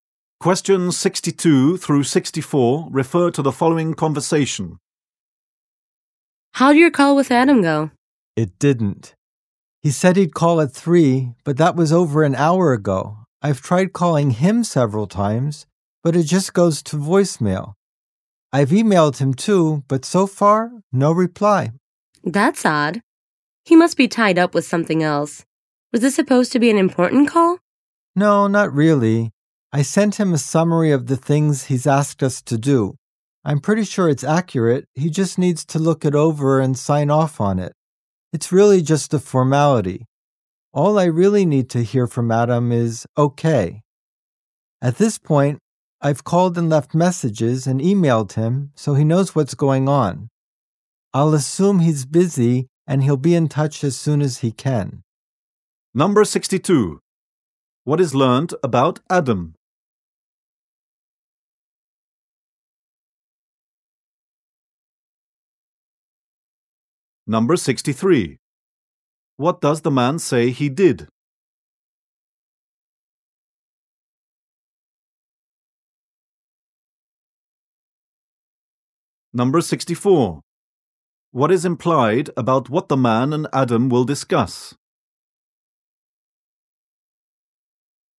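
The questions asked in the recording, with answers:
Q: What is learned about Adam?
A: He missed his scheduled 3 o'clock call.

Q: What does the man say he did?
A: He called, left messages, and emailed Adam.

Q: What is implied about what the man and Adam will discuss?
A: It is not important; it's just a formality.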